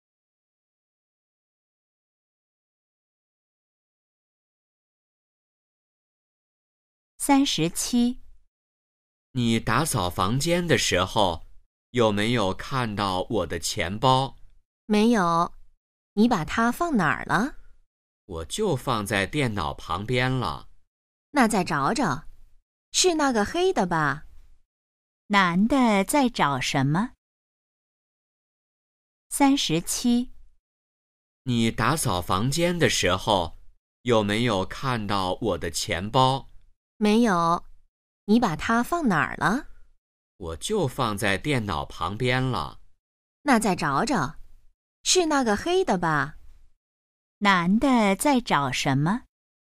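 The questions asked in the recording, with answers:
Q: 男的在找什么?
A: 钱包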